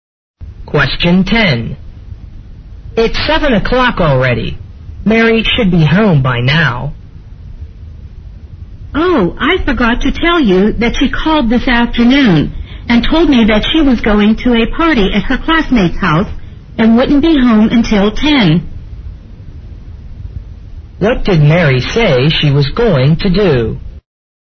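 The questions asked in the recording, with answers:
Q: What did Mary say she was going to do?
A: Go to a party at her classmate's house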